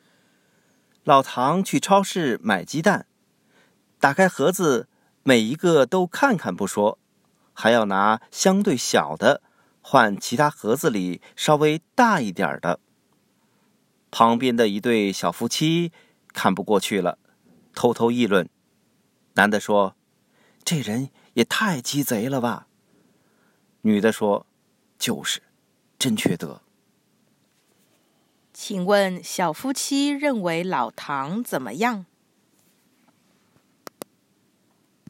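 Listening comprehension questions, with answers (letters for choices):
Listen to the audio texts and questions, tick ONE correct answer to each question.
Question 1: What did the couple say about Lao Tang?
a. He is stealing the chicken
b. He is stealing the eggs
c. He is keen on taking petty advantages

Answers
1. c

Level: Advanced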